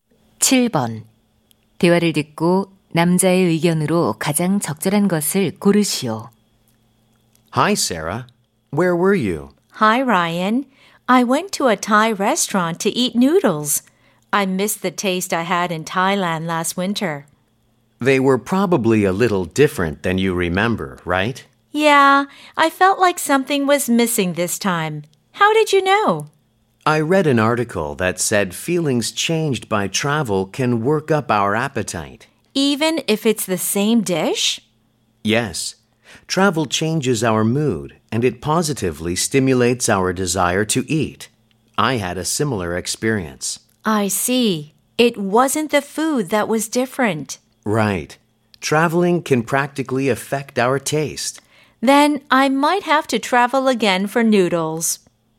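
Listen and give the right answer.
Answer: 여행이 음식 맛에 영향을 줄 수 있다.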